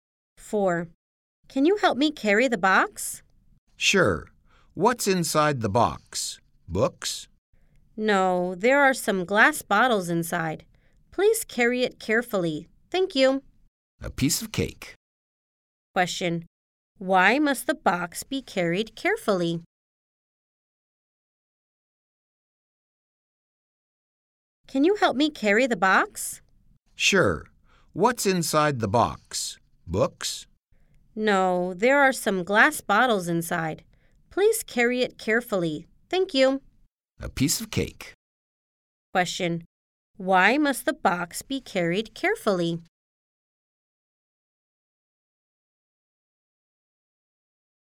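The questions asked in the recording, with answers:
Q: Why must the box be carried carefully?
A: There are glass bottles inside.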